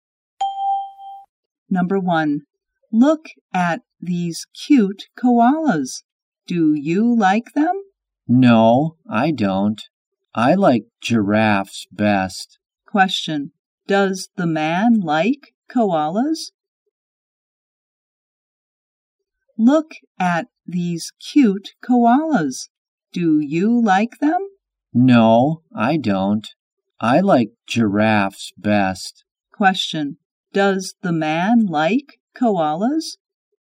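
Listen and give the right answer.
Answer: No, he doesn't.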